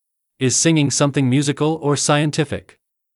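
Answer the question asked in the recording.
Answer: Musical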